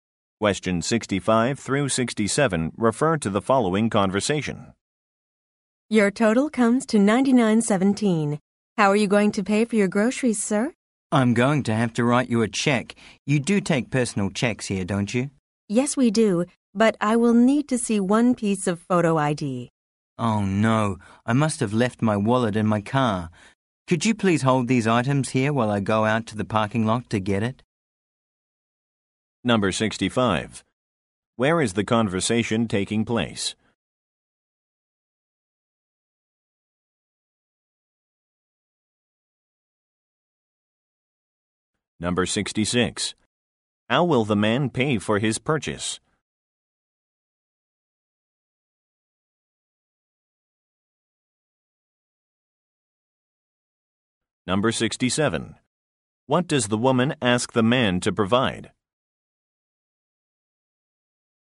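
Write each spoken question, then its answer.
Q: Where is the conversation taking place?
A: At a grocery store

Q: How will the man pay for his purchase?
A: By personal check

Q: What does the woman ask the man to provide?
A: A photo ID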